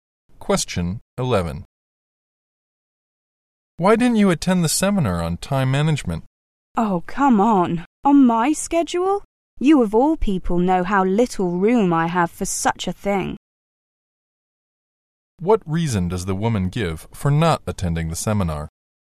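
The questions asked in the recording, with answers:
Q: What reason does the woman give for not attending the seminar?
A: She is too busy; her schedule has no room for it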